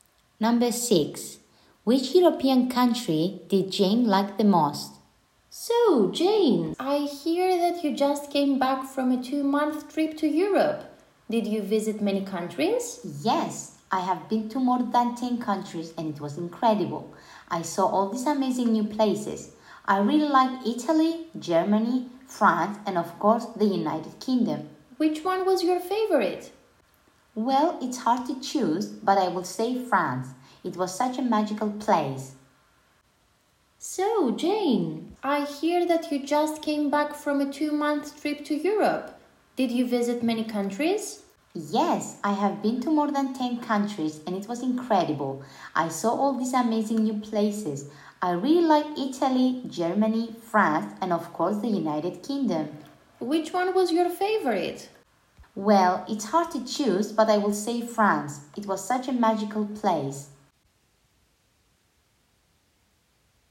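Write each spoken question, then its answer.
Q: Which European country did Jane like the most?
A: France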